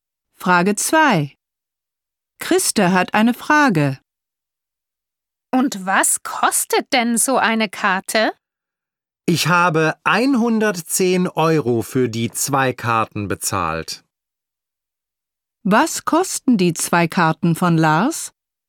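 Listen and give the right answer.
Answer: 110 Euro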